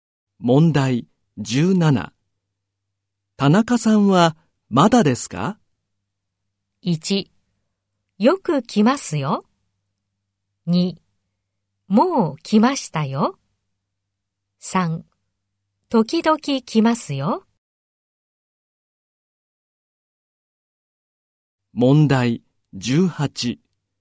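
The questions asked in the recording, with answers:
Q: 田中さんはまだですか?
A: 2: もう来ましたよ。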